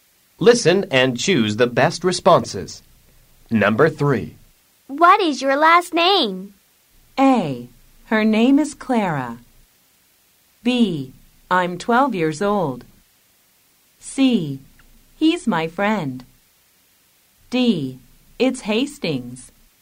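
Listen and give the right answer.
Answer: D: It's Hastings.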